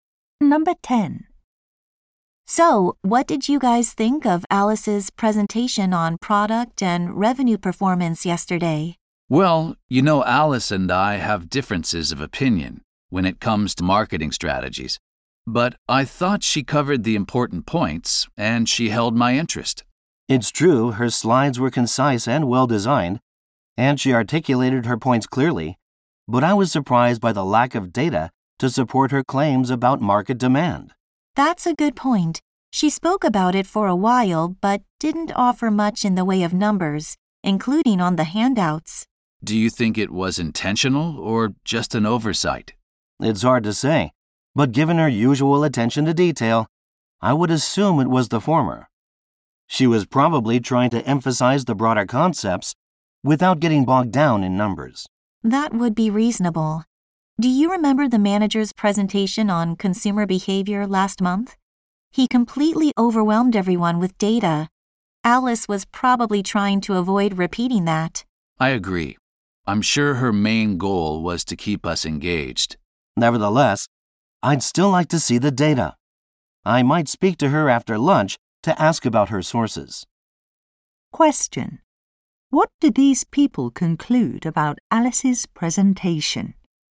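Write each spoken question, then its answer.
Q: What did these people conclude about Alice's presentation?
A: She left out data on purpose to keep the audience engaged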